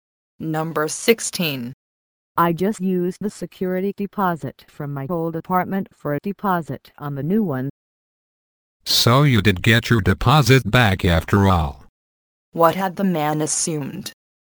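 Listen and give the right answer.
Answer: That the woman would not get her deposit back.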